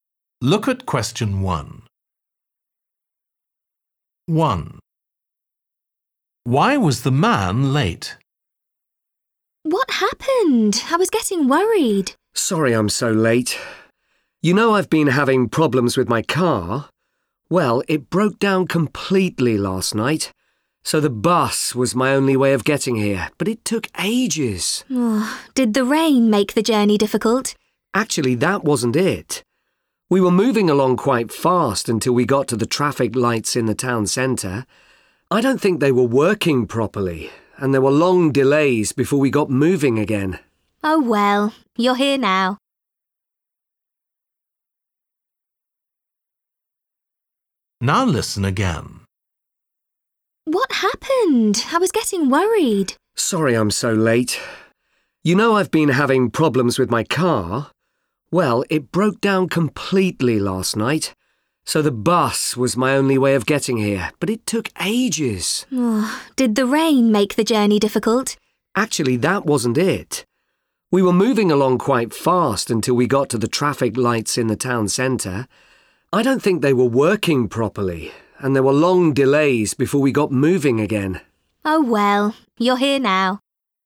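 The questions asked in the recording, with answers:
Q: Why was the man late?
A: The traffic lights in the town centre weren't working, so there were long delays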